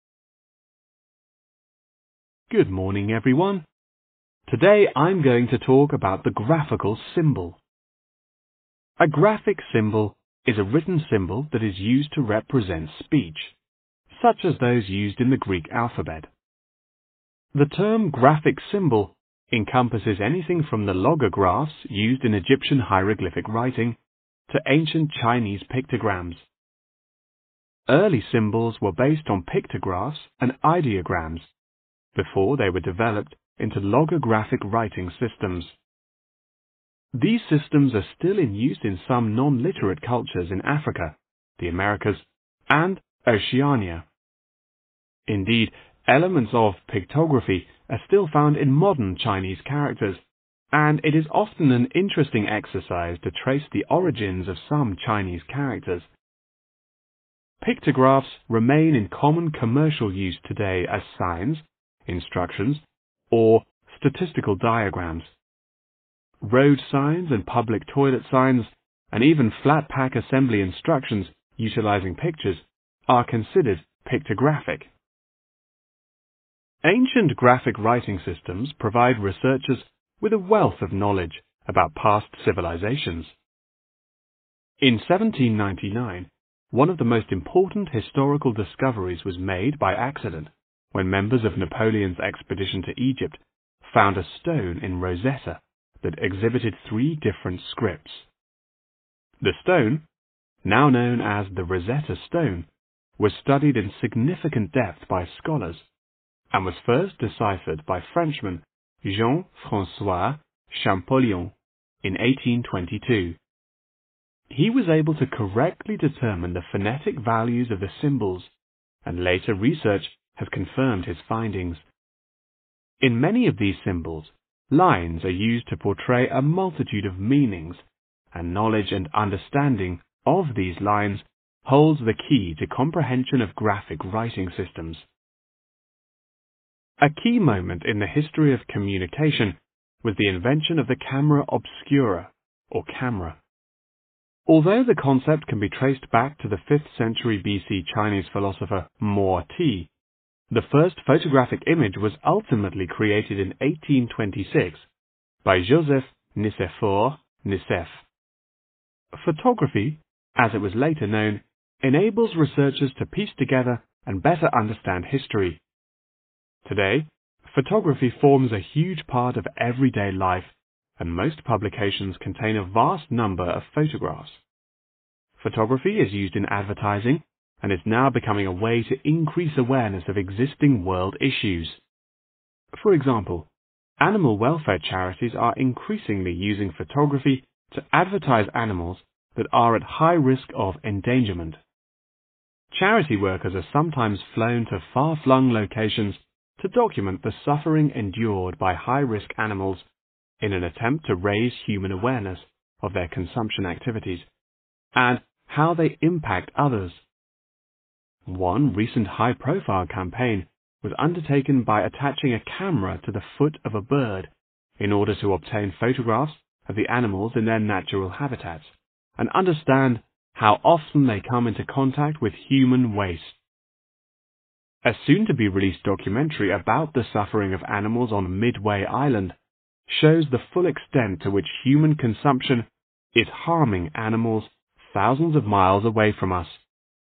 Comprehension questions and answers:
Complete the notes below. Write ONE WORD ONLY for each answer.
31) still has something to do with 31............... use today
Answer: commercial

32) Researchers obtain a wide range of 32............... about past civilisations.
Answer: knowledge

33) In those symbols, 33............... are used to depict various meanings.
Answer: lines

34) 34............... helps people understand history better.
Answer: Photography

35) Some charities will 35............... many endangered species.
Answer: advertise

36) A camera was tied to one 36............... of a bird.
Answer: foot